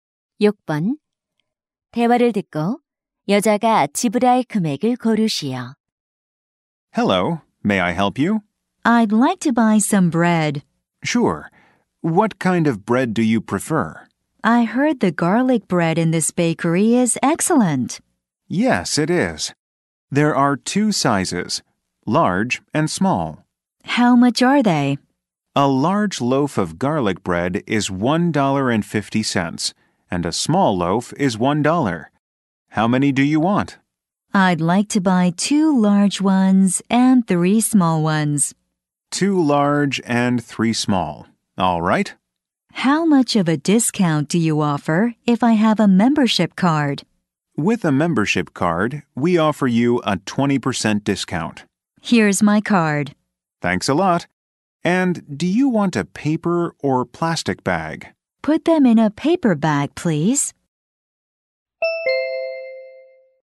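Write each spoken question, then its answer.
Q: 대화를 듣고 여자가 지불할 금액을 고르시오.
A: $4.80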